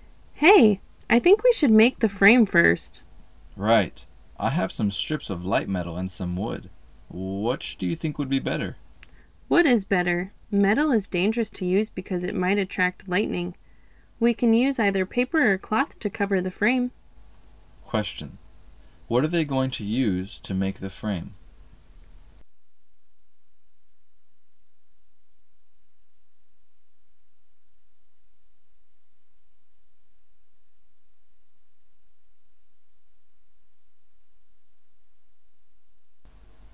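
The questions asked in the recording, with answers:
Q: What are they going to use to make the frame?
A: Wood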